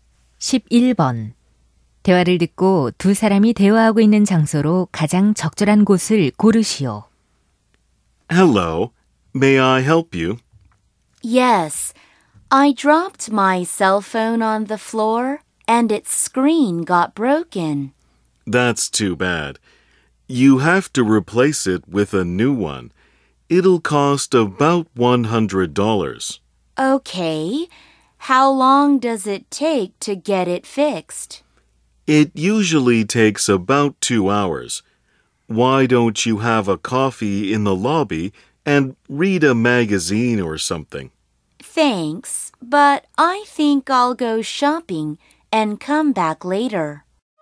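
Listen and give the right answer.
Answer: 휴대전화 수리점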